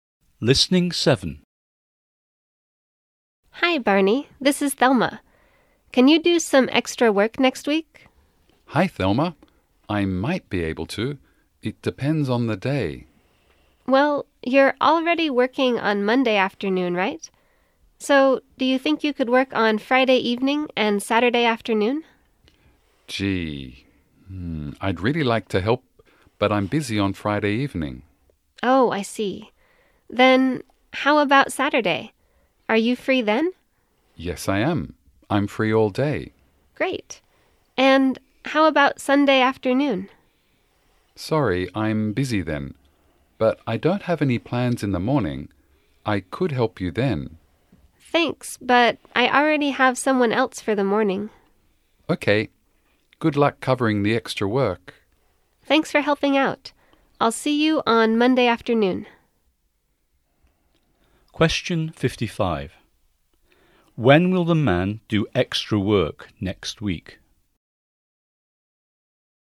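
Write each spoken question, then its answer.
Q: When will the man do extra work next week?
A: On Saturday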